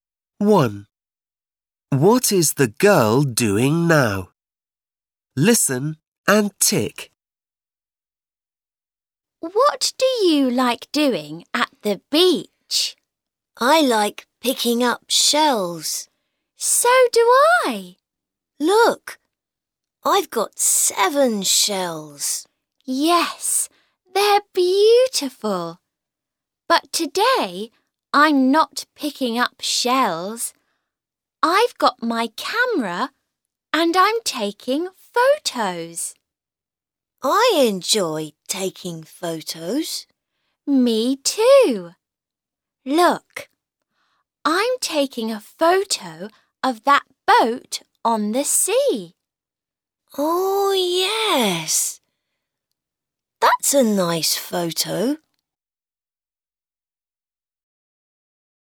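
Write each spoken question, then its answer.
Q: What is the girl doing now?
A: taking photos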